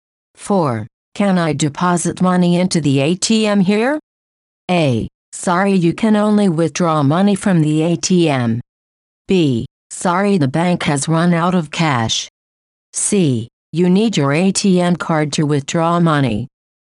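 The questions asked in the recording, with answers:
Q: Can I deposit money into the ATM here?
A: A: Sorry, you can only withdraw money from the ATM.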